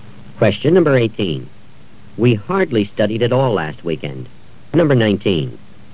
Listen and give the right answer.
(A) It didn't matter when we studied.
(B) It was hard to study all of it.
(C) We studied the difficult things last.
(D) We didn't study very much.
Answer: (D) We didn't study very much.

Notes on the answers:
We hardly studied at all last weekend.

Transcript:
17. After the speech came a brief question-and-answer session.
18. We hardly studied at all last weekend.